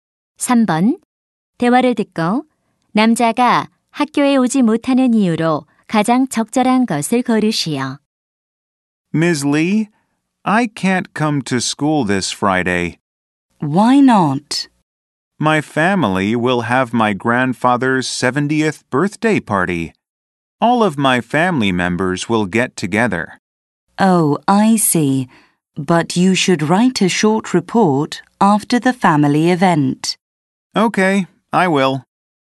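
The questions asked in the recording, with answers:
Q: 대화를 듣고 남자가 학교에 오지 못하는 이유로 가장 적절한 것을 고르시오.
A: 할아버지의 칠순 잔치 때문에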